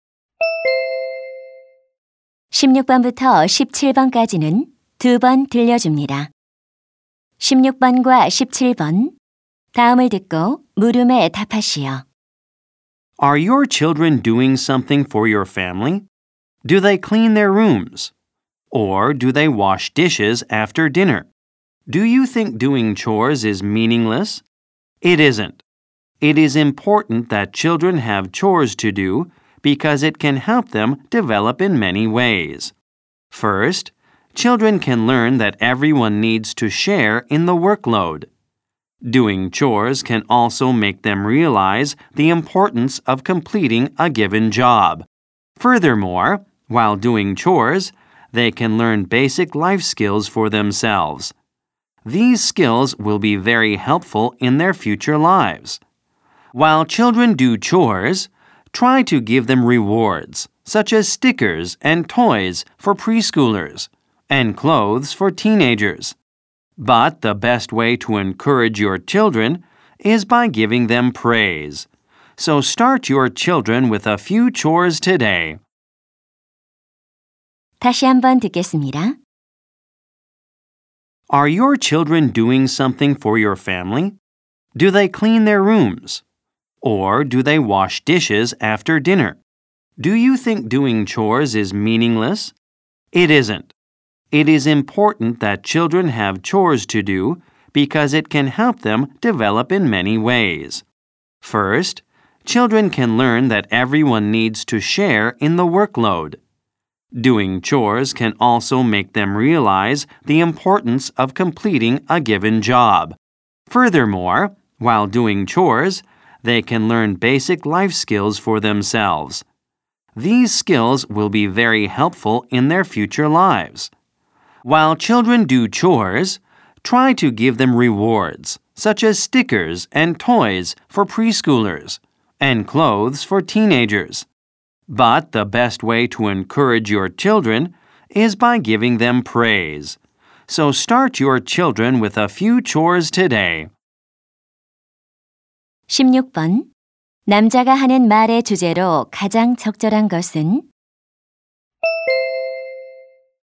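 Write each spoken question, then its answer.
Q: 16번 남자가 하는 말의 주제로 가장 적절한 것은?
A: 아이들에게 집안일을 시키는 것의 중요성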